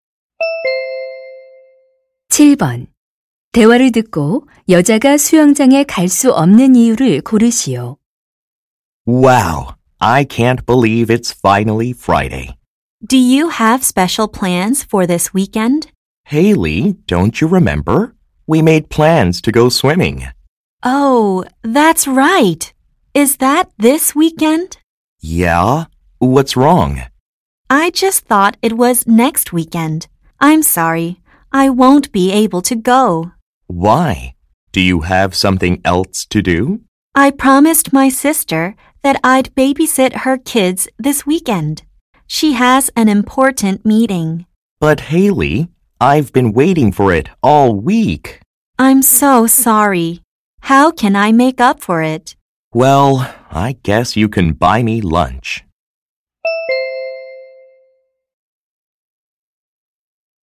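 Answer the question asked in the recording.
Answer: 언니(여동생)의 아이들을 돌봐야 해서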